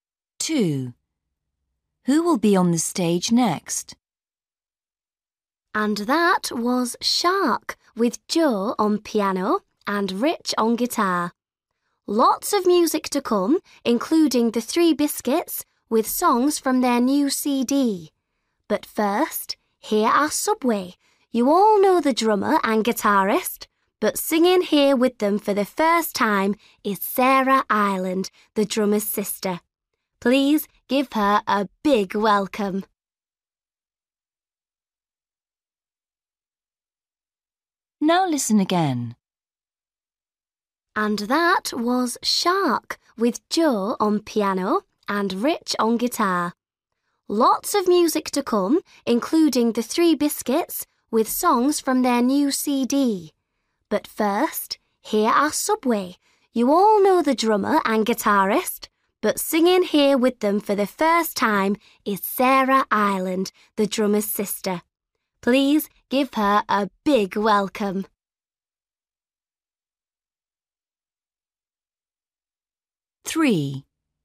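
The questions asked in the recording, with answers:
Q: Who will be on the stage next?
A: Subway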